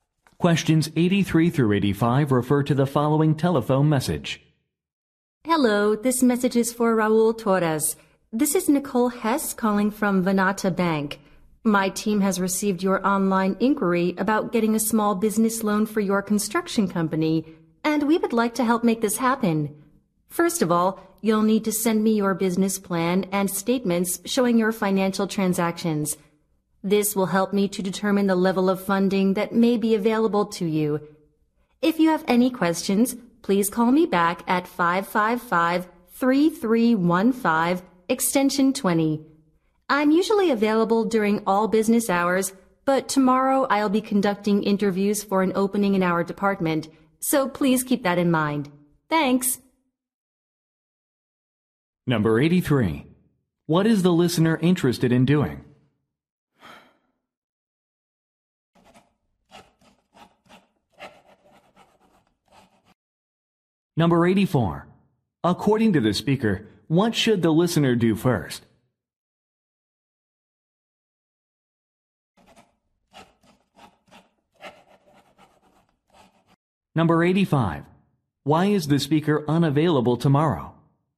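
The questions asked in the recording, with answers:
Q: What is the listener interested in doing?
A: Getting a small business loan

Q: According to the speaker, what should the listener do first?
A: Send a business plan and financial statements

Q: Why is the speaker unavailable tomorrow?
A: She will be conducting job interviews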